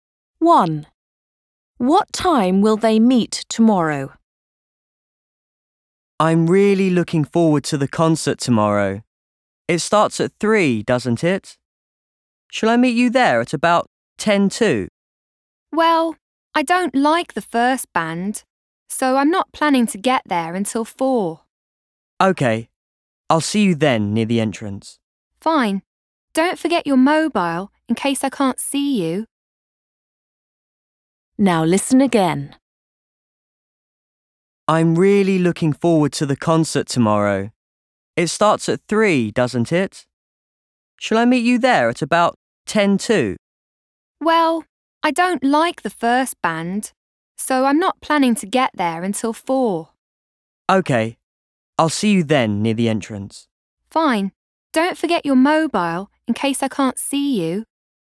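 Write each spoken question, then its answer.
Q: What time will they meet tomorrow?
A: At 4 o'clock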